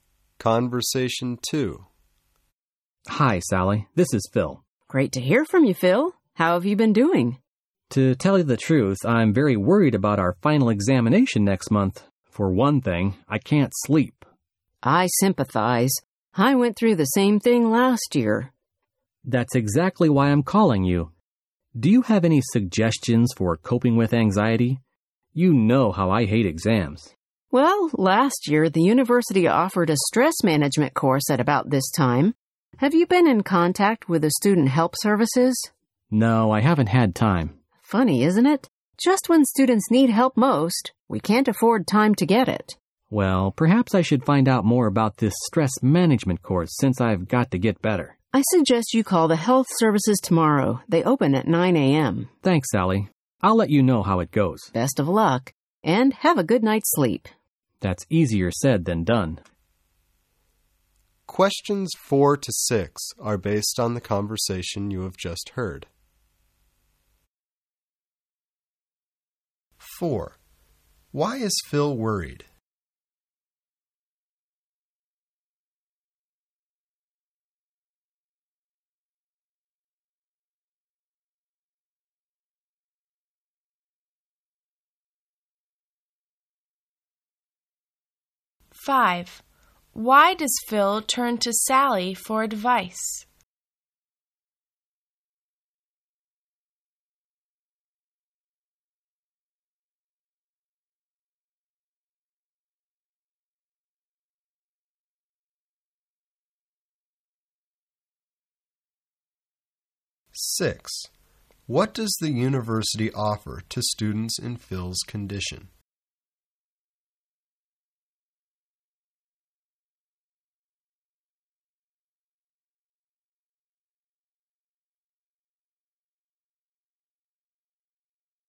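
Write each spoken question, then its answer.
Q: Why is Phil worried?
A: He has his final examination next month

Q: Why does Phil turn to Sally for advice?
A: She went through the same thing last year

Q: What does the university offer to students in Phil's condition?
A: A stress management course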